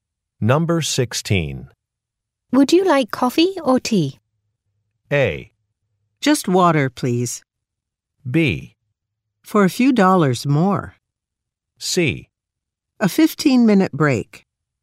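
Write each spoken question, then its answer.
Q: Would you like coffee or tea?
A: A: Just water, please.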